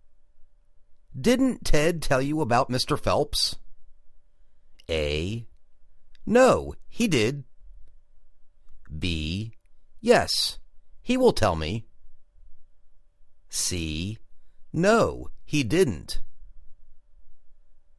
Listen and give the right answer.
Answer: No, he didn't